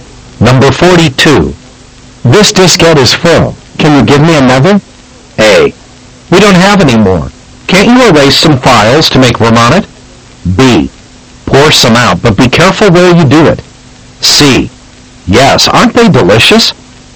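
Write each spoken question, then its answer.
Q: This diskette is full. Can you give me another?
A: A: We don't have any more. Can't you erase some files to make room on it?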